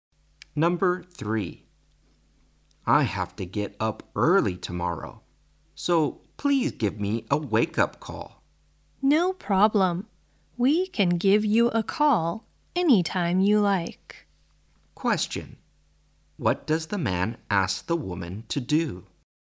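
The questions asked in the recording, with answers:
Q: What does the man ask the woman to do?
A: Give him a wake-up call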